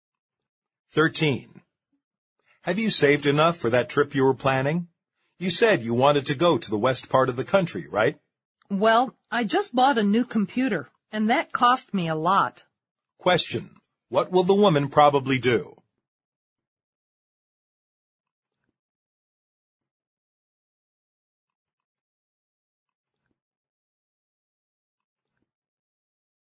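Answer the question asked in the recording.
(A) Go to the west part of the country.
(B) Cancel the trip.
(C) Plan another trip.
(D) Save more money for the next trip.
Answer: (B) Cancel the trip.

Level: 六级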